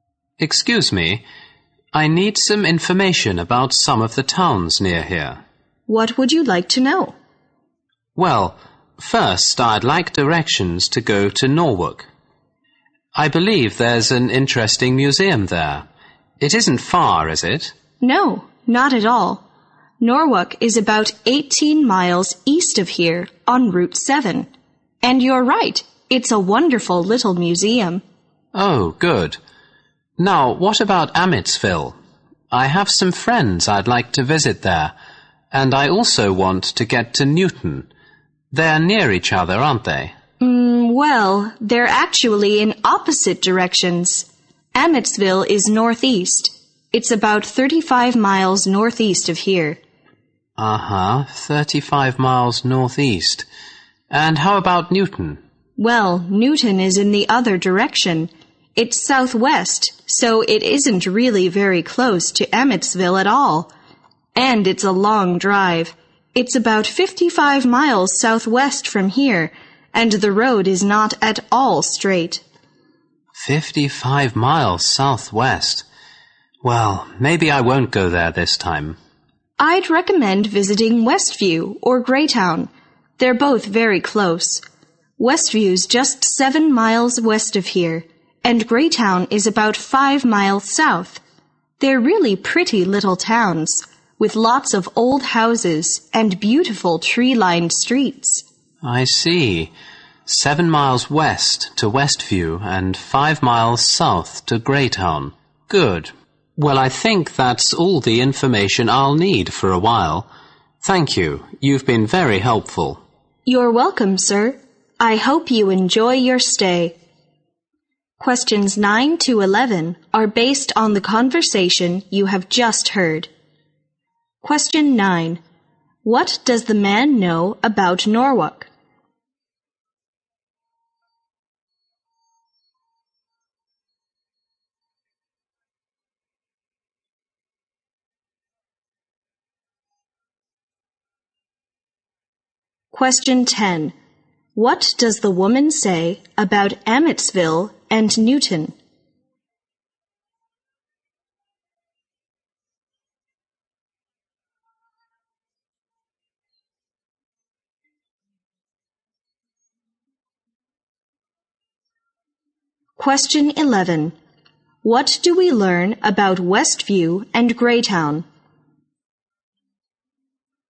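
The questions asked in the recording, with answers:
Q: What does the man know about Norwalk?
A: It has an interesting museum.

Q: What does the woman say about Amitsville and Newton?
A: They are in opposite directions, not close to each other.

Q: What do we learn about Westview and Greytown?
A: They are very close and are pretty little towns with old houses.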